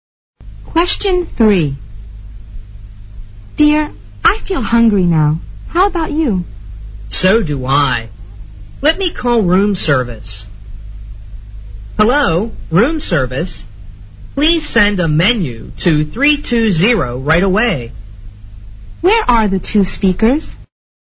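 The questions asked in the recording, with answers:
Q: Where are the two speakers?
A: In a hotel room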